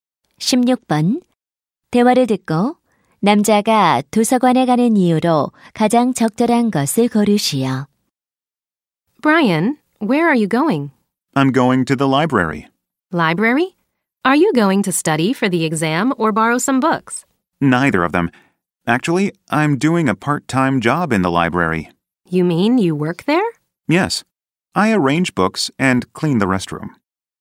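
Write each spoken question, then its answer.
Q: 대화를 듣고 남자가 도서관에 가는 이유로 가장 적절한 것을 고르시오.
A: 아르바이트를 하러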